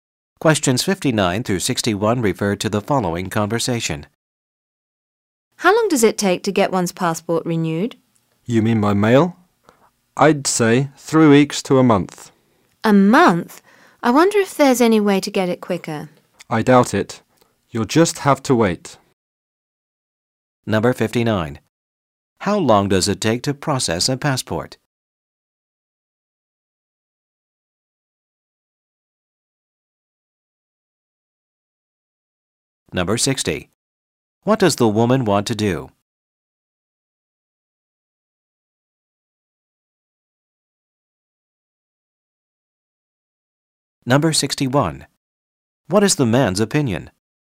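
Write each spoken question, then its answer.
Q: How long does it take to process a passport?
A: 3 weeks to a month

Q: What does the woman want to do?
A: Get her passport renewed more quickly

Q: What is the man's opinion?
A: She will just have to wait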